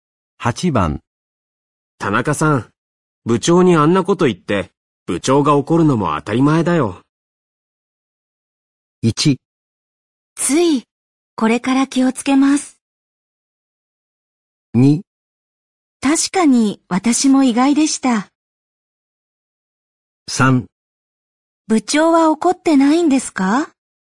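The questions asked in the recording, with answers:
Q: 田中さん、部長にあんなこと言って、部長が怒るのも当たり前だよ。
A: 1: つい、これから気をつけます。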